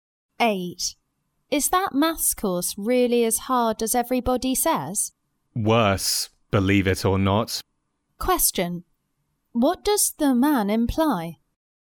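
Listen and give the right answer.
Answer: The course is even harder than people say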